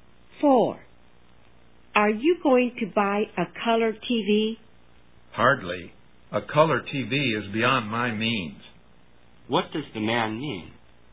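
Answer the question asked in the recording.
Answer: He can't afford a color TV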